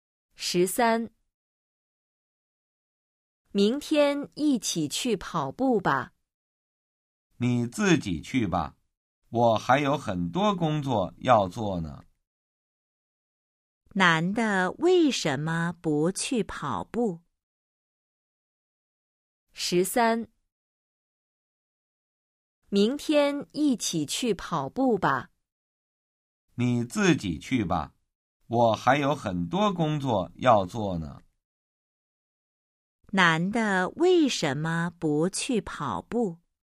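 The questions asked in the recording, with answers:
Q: 男的为什么不去跑步?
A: 他还有很多工作要做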